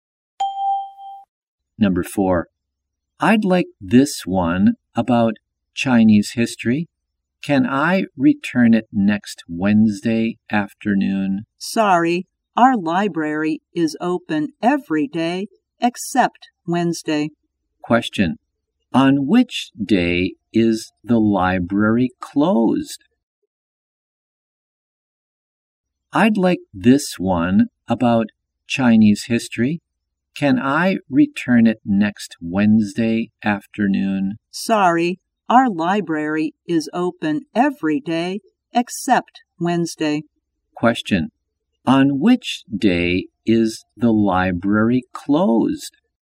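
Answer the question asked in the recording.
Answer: Wednesday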